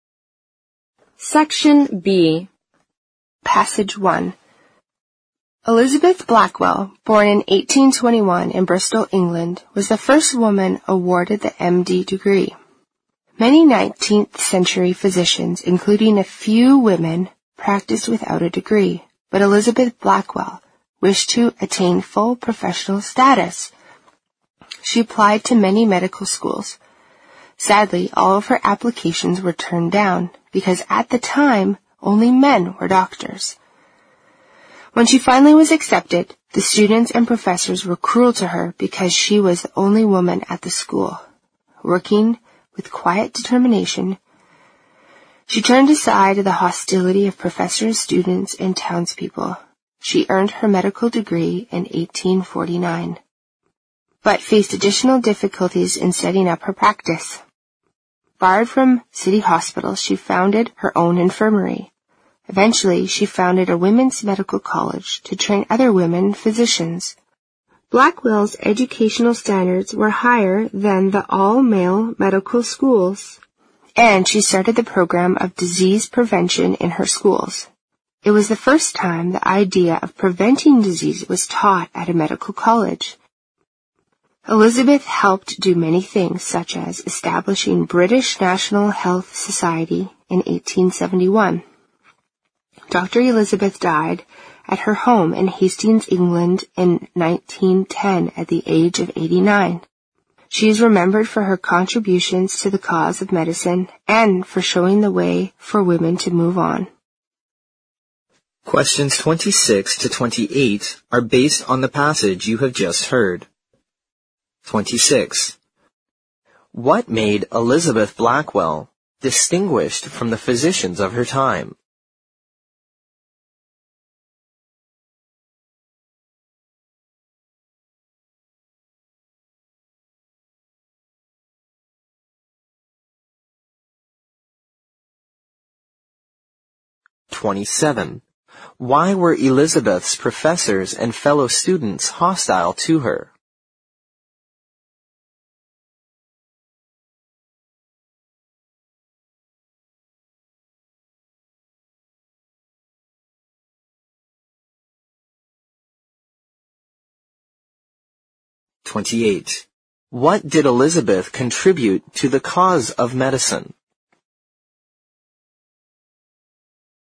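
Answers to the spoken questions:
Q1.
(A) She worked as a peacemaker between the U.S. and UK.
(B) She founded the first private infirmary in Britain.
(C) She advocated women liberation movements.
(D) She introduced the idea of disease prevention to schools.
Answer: (D) She introduced the idea of disease prevention to schools.
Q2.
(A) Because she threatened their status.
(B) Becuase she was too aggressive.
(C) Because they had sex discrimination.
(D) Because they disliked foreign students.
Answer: (C) Because they had sex discrimination.
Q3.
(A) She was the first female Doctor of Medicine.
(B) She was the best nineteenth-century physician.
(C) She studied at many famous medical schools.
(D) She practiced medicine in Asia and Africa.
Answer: (A) She was the first female Doctor of Medicine.

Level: 四级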